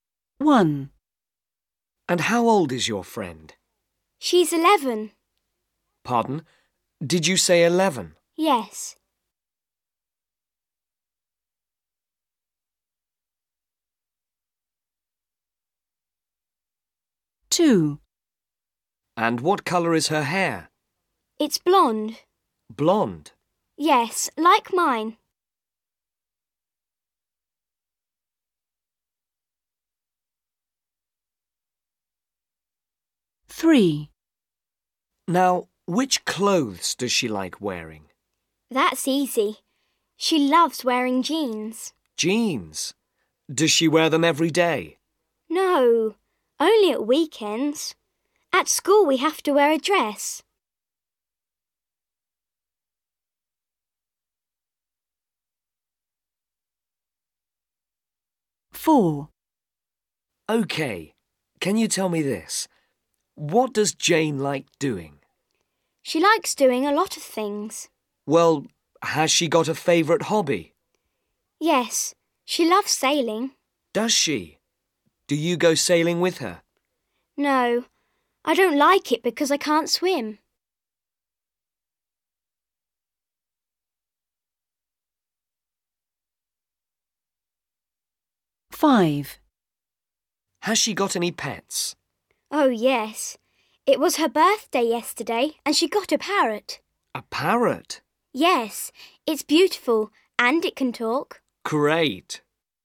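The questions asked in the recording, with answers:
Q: And how old is your friend?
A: 11

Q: And what colour is her hair?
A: blonde

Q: Now, which clothes does she like wearing?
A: jeans

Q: What does Jane like doing?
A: sailing

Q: Has she got any pets?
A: a parrot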